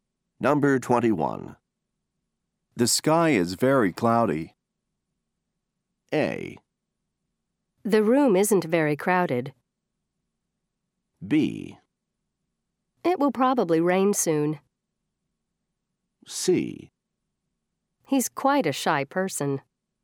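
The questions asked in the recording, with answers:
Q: The sky is very cloudy.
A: B: It will probably rain soon.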